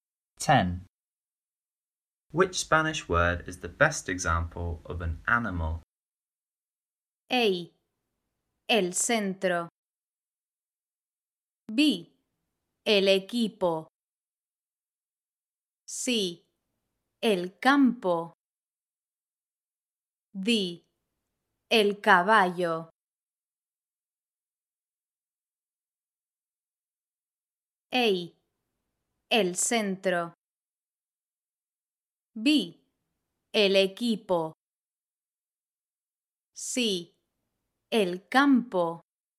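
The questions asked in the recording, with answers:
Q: Which Spanish word is the best example of an animal?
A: D: El caballo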